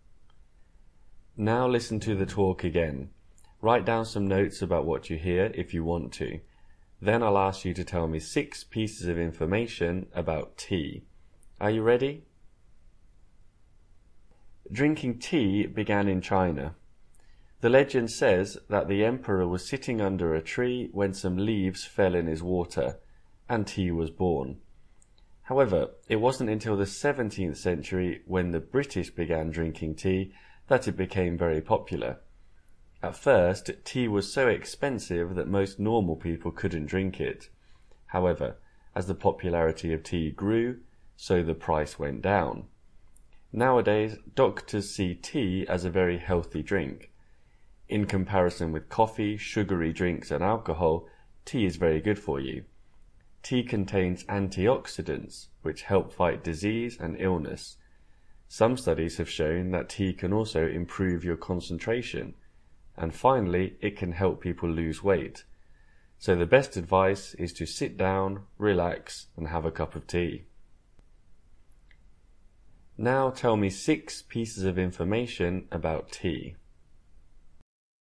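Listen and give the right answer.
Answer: It began in China; it became popular in the 17th century with the British; it was expensive at first; it is healthy; it contains antioxidants; it can improve concentration and help weight loss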